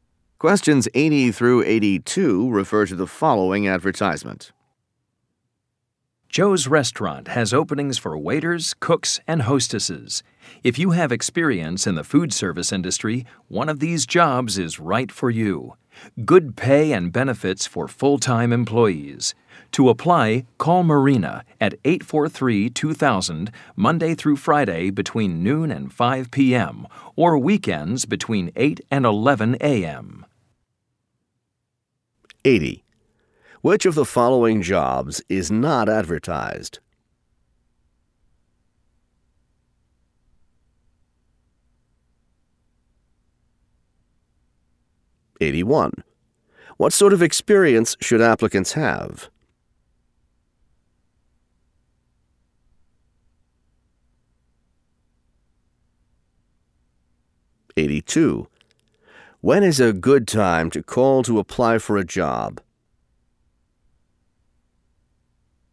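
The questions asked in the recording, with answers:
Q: What sort of experience should applicants have?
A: Food service experience

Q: When is a good time to call to apply for a job?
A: Weekdays noon to 5 p.m., or weekends 8 to 11 a.m.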